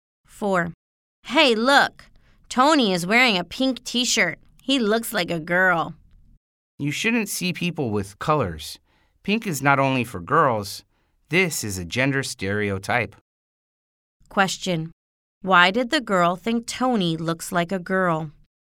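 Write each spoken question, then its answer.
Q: Why did the girl think Tony looks like a girl?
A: Because he is wearing a pink T-shirt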